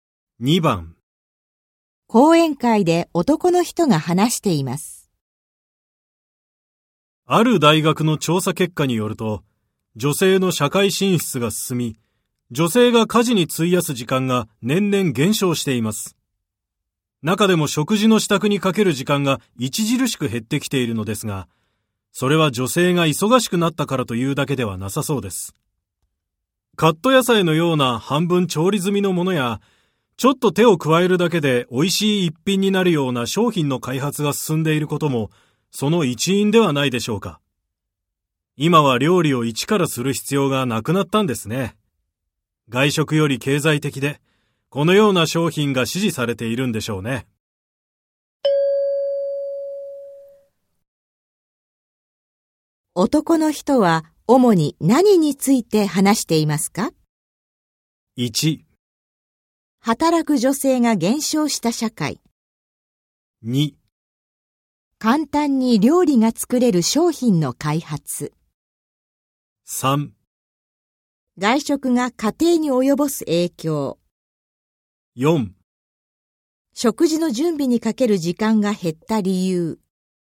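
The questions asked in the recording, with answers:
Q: 男の人は主に何について話していますか?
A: 4: 食事の準備にかける時間が減った理由。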